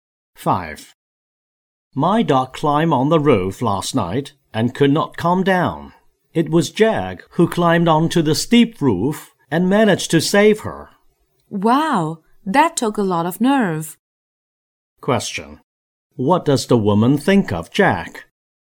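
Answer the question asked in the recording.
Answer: He is brave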